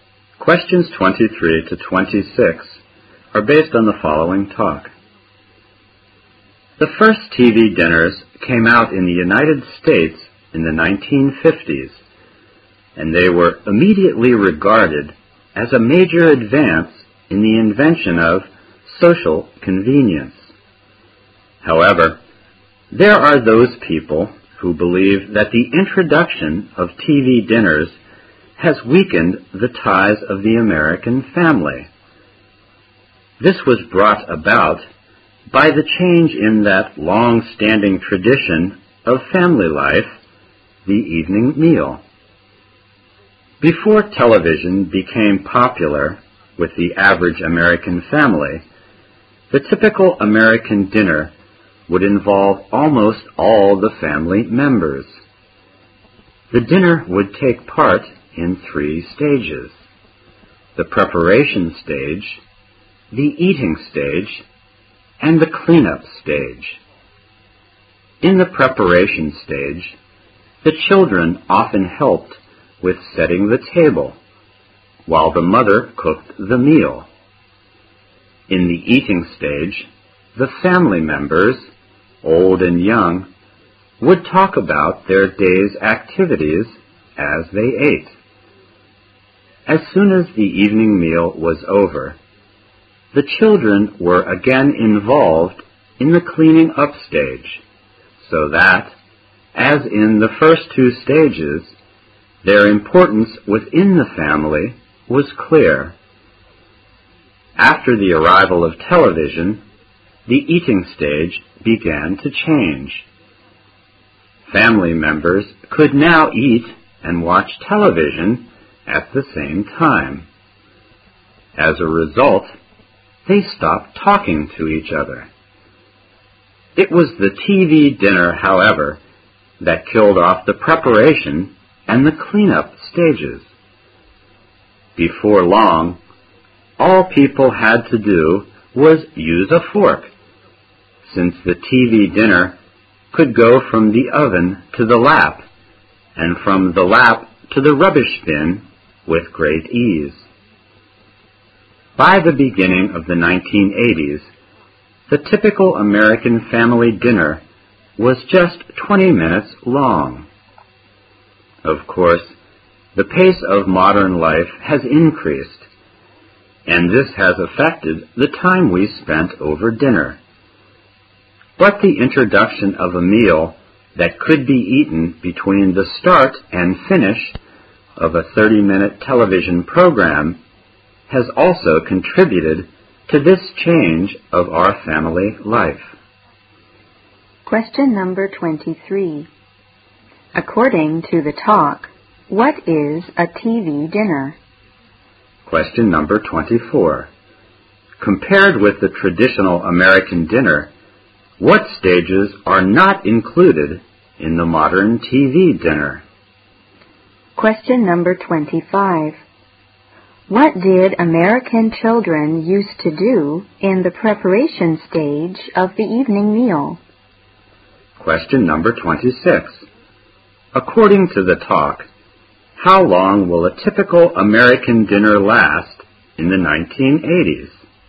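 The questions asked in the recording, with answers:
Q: Compared with the traditional American dinner, what stages are not included in the modern TV dinner?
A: The preparation and cleanup stages

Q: What did American children used to do in the preparation stage of the evening meal?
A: Helped set the table

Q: According to the talk, how long will a typical American dinner last in the 1980s?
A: 20 minutes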